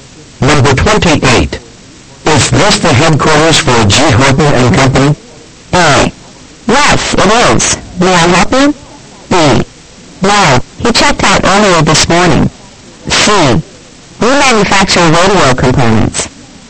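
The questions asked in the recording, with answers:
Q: Is this the headquarters for G.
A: A: Yes, it is. May I help you?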